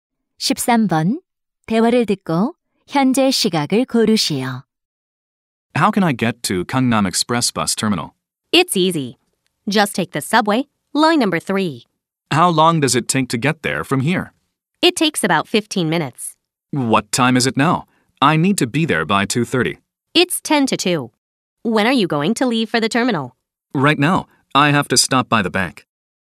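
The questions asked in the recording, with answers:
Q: 대화를 듣고 현재 시각을 고르시오.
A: 1시 50분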